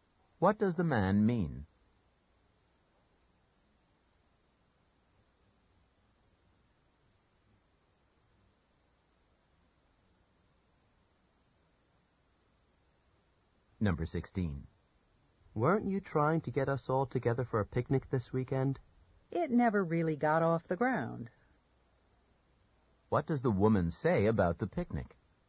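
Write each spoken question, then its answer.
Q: What does the woman say about the picnic?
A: It didn't happen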